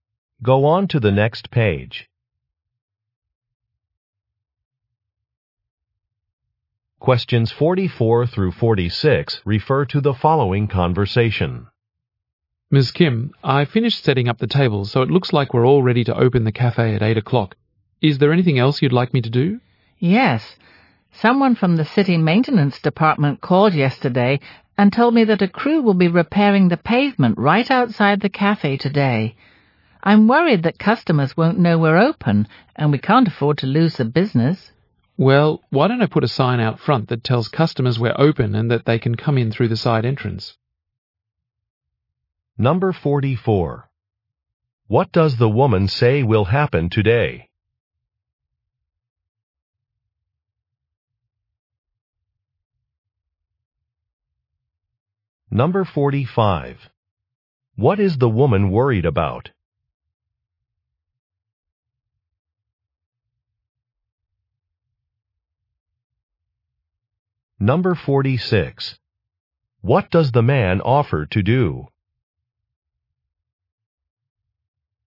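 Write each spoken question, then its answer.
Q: What does the woman say will happen today?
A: A crew will repair the pavement outside the cafe

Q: What is the woman worried about?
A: Losing business because customers won't know they're open

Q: What does the man offer to do?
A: Put a sign out front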